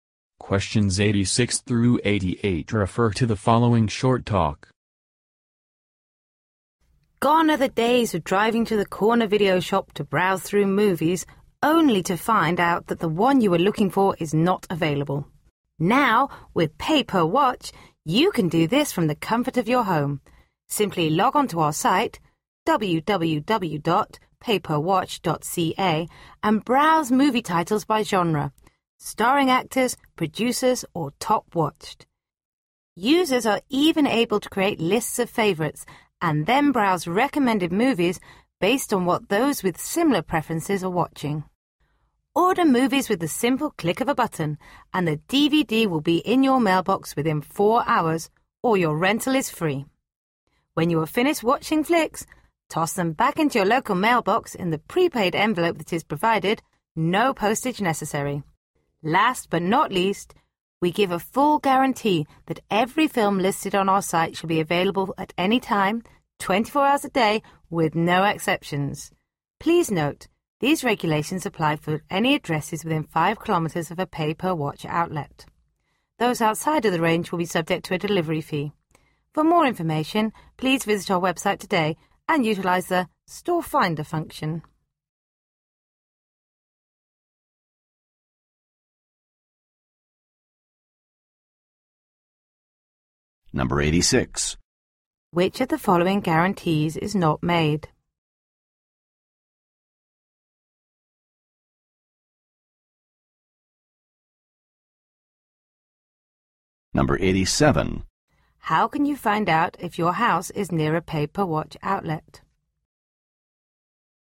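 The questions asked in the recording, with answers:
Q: How can you find out if your house is near a pay-per-watch outlet?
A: Use the Store Finder on the website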